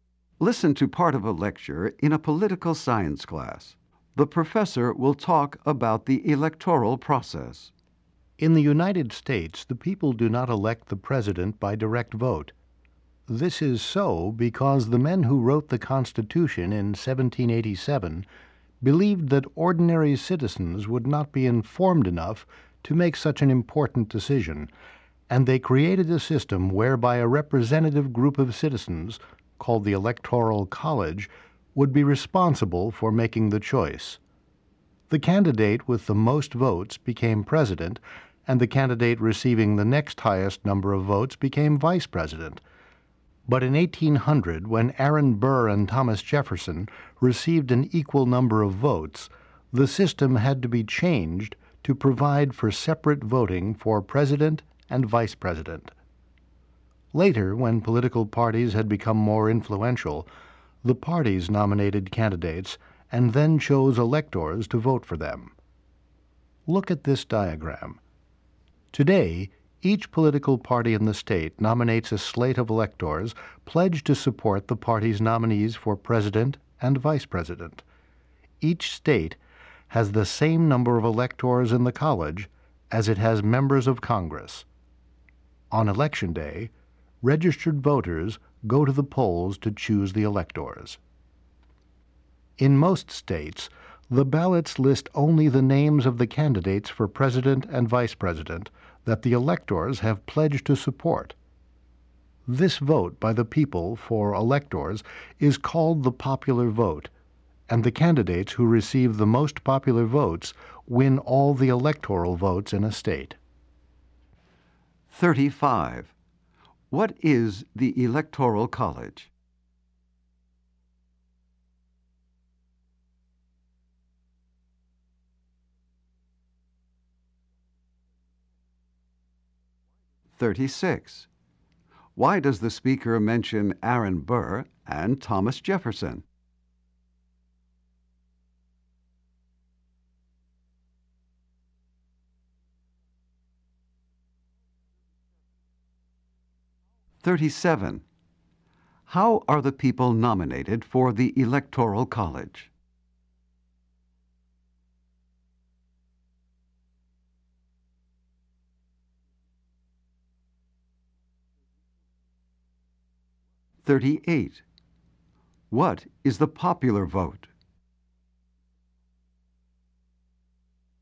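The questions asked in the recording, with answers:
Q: What is the Electoral College?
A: A representative group of citizens who choose the president

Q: Why does the speaker mention Aaron Burr and Thomas Jefferson?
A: Their tie in 1800 led to a change in the system

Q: How are the people nominated for the Electoral College?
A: The political parties nominate them

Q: What is the popular vote?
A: The people's vote for electors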